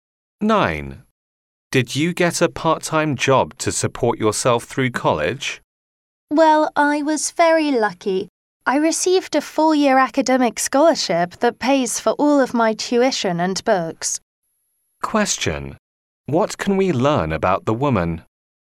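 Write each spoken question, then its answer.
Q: What can we learn about the woman?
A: She got a scholarship covering her tuition and books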